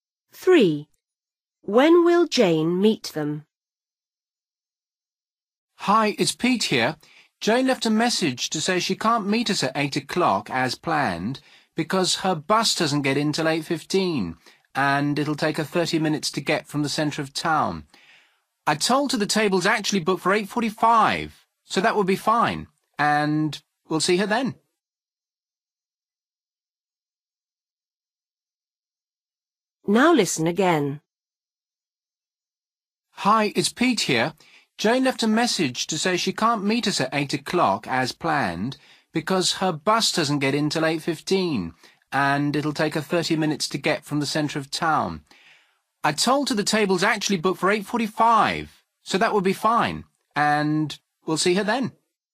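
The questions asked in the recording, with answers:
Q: When will Jane meet them?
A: 8:45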